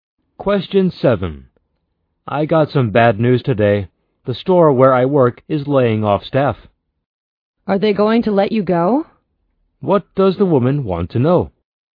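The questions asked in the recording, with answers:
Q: What does the woman want to know?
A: Whether the man will lose his job.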